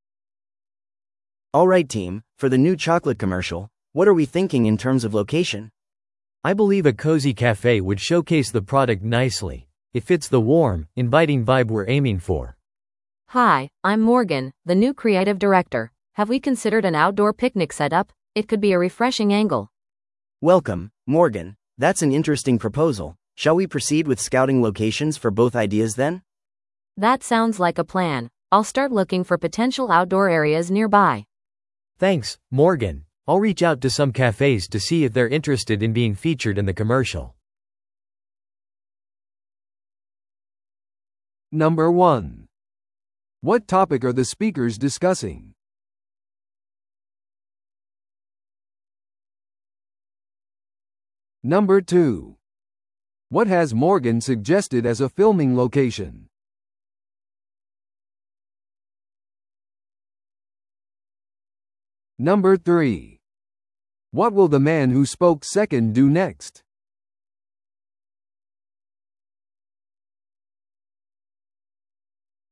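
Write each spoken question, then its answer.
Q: What topic are the speakers discussing?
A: Choosing a location for a chocolate commercial

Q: What has Morgan suggested as a filming location?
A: An outdoor picnic setup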